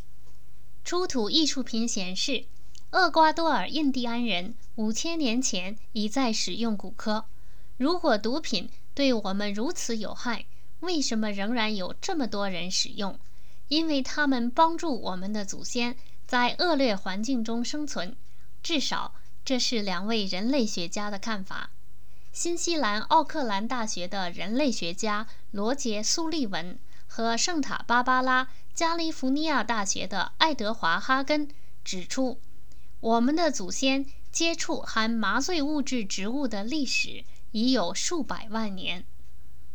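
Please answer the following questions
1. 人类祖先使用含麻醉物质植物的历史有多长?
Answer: 数百万年

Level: 3rd Year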